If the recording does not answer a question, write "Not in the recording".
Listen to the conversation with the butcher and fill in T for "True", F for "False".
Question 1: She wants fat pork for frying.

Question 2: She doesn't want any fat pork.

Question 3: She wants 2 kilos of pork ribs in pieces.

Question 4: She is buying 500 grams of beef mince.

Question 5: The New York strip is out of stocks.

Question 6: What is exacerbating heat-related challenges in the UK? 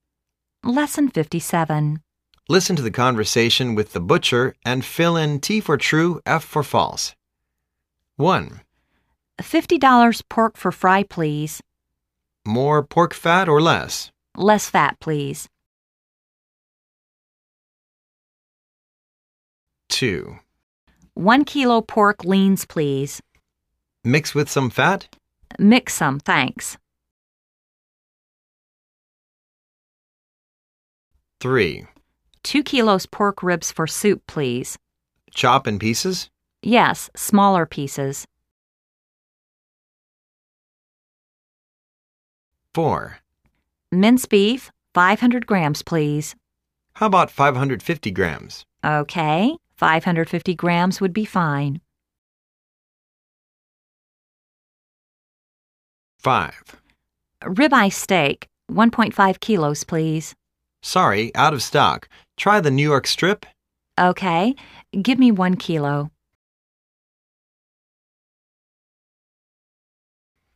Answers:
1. F
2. F
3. T
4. F
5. F
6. Not in the recording